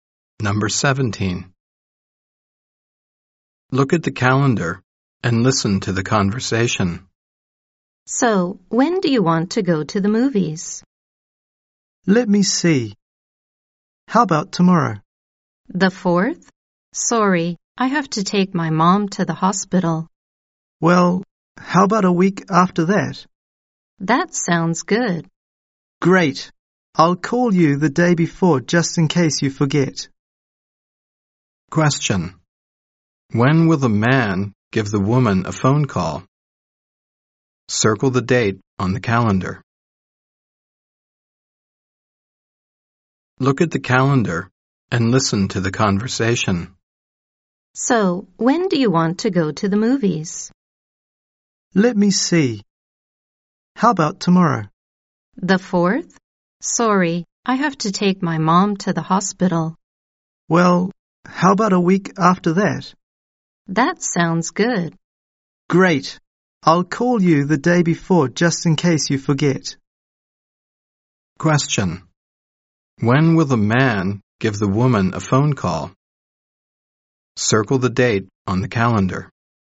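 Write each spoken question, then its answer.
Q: When will the man give the woman a phone call?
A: The 10th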